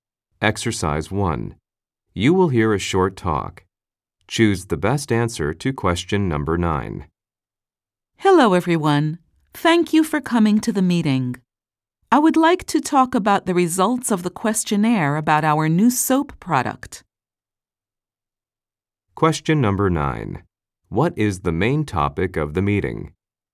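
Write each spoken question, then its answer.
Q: What is the main topic of the meeting?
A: The results of the questionnaire about the new soap product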